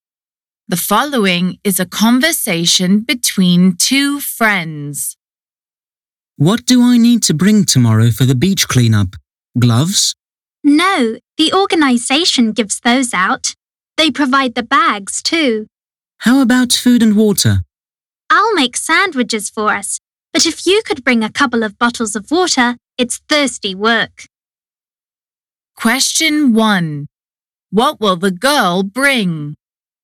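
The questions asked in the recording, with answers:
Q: What will the girl bring?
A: bottles of water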